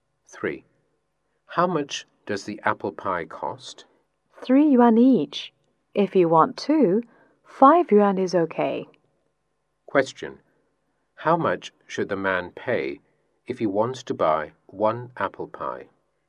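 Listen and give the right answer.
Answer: 3 yuan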